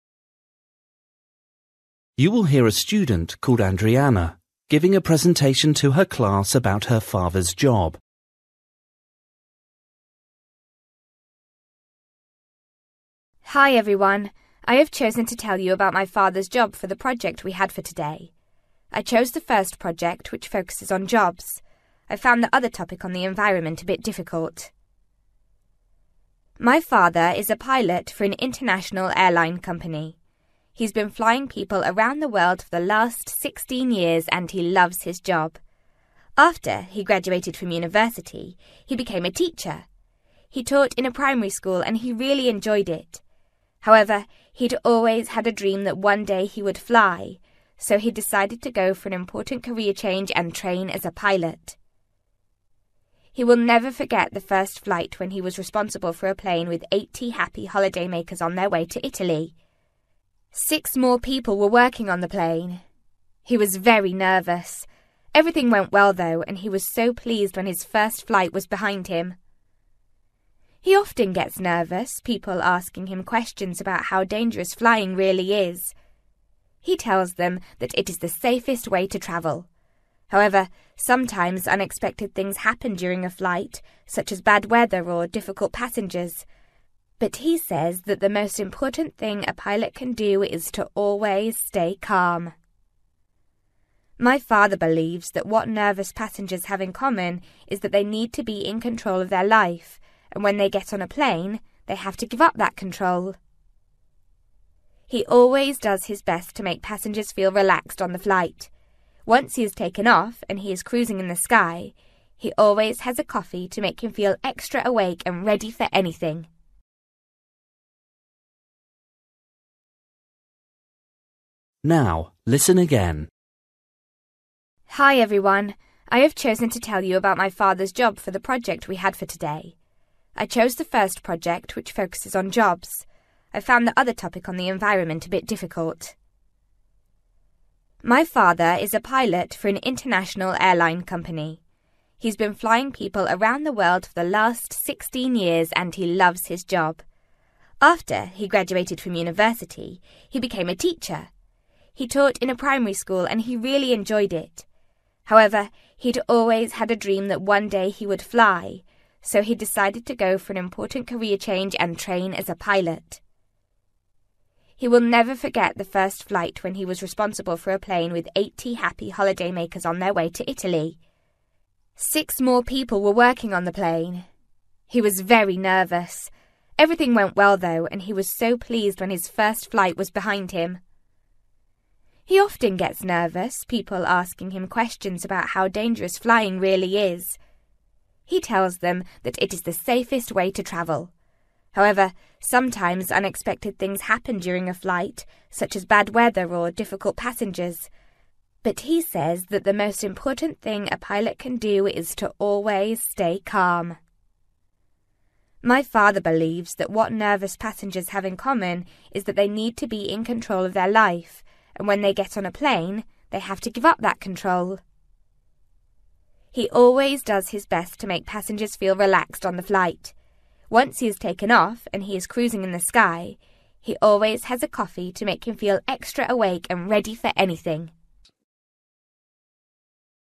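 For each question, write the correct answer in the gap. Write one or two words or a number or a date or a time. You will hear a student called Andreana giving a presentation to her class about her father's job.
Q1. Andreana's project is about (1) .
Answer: jobs

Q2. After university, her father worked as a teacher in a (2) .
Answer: primary school

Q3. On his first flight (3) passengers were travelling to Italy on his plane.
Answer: 80

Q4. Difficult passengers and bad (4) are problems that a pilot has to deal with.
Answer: weather

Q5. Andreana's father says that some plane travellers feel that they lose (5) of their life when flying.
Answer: control

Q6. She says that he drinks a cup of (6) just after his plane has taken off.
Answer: coffee

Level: Luyện nghe trình độ B1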